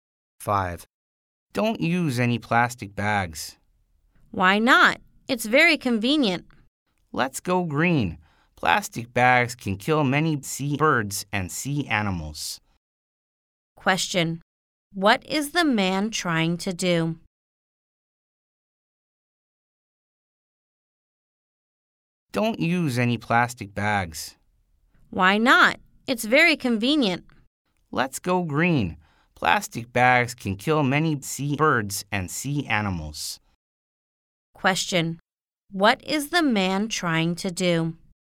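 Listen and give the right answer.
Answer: Get the woman to stop using plastic bags and go green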